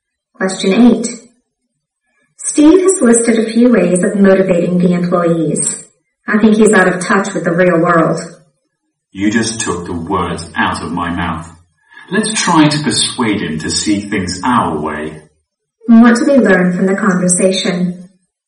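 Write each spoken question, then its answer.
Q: What do we learn from the conversation?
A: Both speakers think Steve's ideas are unrealistic.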